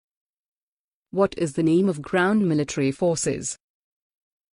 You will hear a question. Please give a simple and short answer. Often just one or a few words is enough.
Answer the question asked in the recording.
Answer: Army